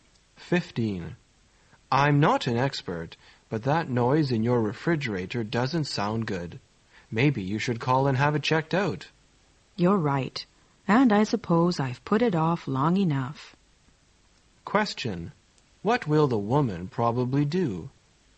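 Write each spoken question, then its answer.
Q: What will the woman probably do?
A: Call to have the refrigerator checked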